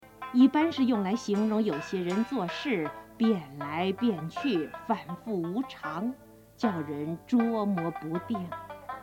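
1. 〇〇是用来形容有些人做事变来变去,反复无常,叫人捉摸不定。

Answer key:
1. 一般 yìbān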